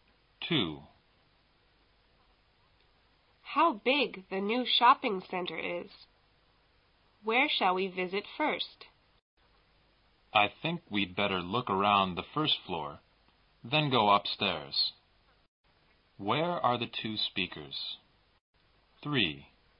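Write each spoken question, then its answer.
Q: Where are the two speakers?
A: In a new shopping center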